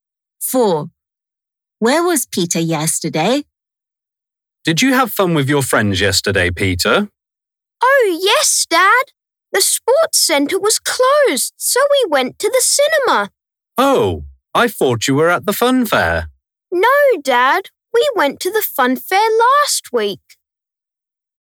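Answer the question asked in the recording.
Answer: at the cinema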